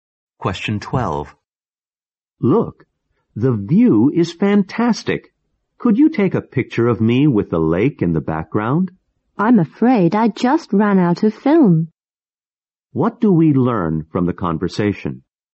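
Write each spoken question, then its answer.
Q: What do we learn from the conversation?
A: The man can't take the picture because he has run out of film.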